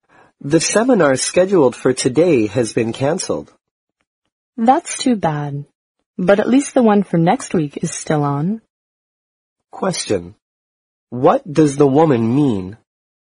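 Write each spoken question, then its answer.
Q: What does the woman mean?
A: She's disappointed, but glad next week's seminar is still on.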